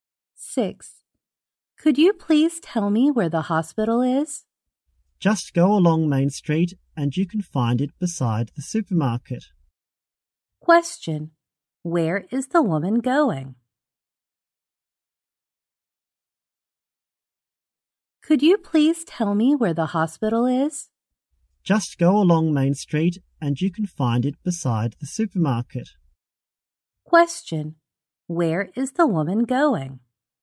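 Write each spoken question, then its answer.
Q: Where is the woman going?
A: To the hospital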